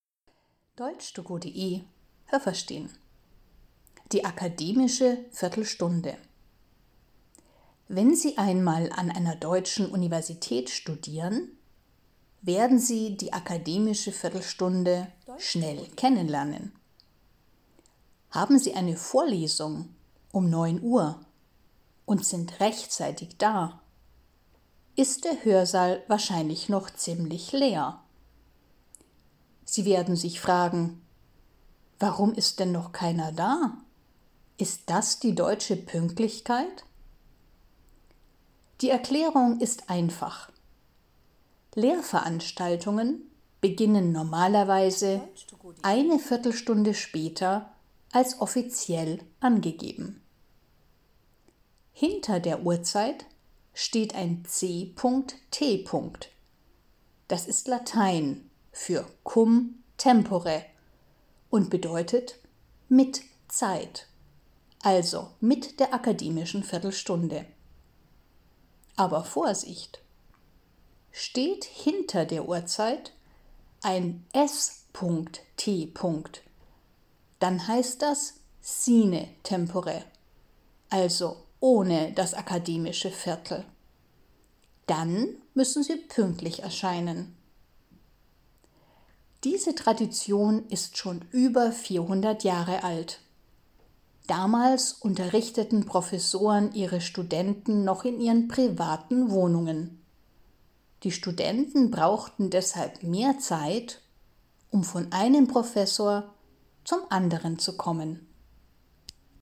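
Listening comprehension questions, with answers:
Was haben Sie gehört? Es gibt nur eine korrekte Antwort.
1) Die akademische Viertelstunde gibt es nur an deutschen ...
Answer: Universitäten

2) Eine Vorlesung um 09:00 Uhr beginnt normalerweise ...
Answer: um 9:15 Uhr (eine Viertelstunde später)

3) 10:00 Uhr c.t. bedeutet: Die Lehrveranstaltung beginnt ...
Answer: um 10:15 Uhr (mit der akademischen Viertelstunde)

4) 10:00 Uhr s.t. heißt: Die Vorlesung beginnt ...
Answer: pünktlich um 10:00 Uhr

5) Diese akademische Viertelstunde gibt es an Universitäten schon ...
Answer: über 400 Jahre

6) Damals fand der Unterricht in den privaten Wohnungen _____ statt.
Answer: der Professoren

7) Die Studenten brauchten die akademische Viertelstunde, ...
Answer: um von einem Professor zum anderen zu kommen

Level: A (einfach)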